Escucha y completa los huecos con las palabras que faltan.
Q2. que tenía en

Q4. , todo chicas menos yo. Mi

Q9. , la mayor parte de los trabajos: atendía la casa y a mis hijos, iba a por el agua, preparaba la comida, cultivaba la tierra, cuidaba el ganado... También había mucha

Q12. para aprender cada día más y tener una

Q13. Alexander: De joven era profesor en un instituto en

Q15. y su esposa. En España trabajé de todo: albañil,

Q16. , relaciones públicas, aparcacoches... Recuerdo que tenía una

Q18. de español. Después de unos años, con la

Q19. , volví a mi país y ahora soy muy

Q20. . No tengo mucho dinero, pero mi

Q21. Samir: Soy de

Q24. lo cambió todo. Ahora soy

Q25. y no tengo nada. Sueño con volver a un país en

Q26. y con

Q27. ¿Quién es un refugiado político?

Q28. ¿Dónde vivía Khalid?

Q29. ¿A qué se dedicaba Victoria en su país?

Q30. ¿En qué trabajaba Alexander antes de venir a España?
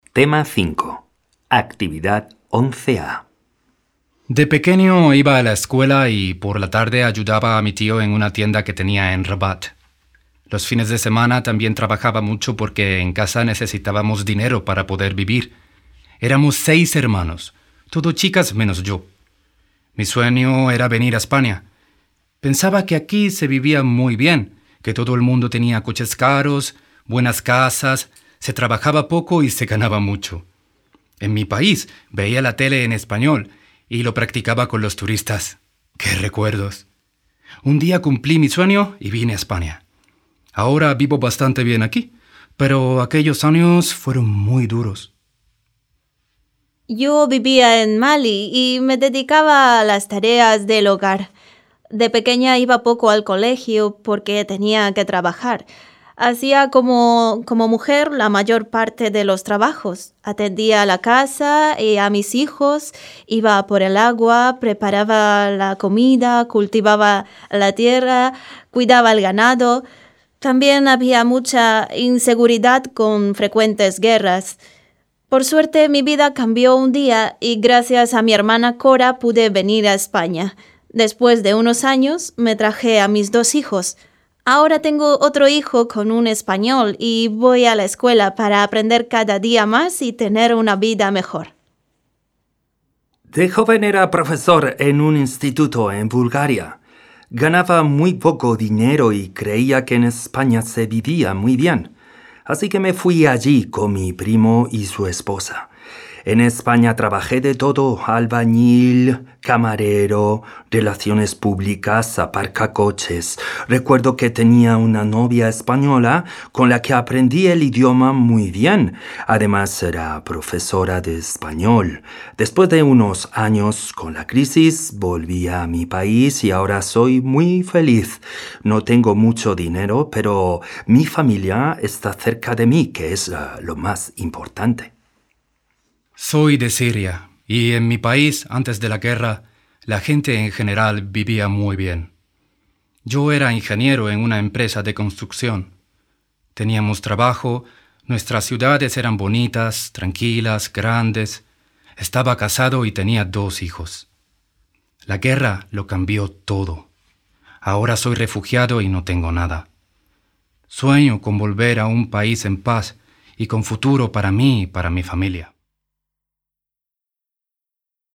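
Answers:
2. Rabat
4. sueño
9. inseguridad
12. vida
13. Bulgaria
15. camarero
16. novia
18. crisis
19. feliz
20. familia
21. Siria
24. refugiado
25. paz
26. futuro
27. Samir
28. En Rabat
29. A las tareas del hogar
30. Era profesor en un instituto en Bulgaria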